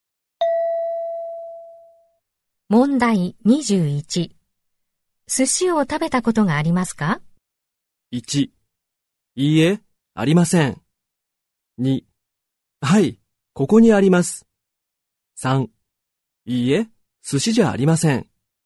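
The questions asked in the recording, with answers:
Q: 寿司を食べたことがありますか?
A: 1: いいえ、ありません。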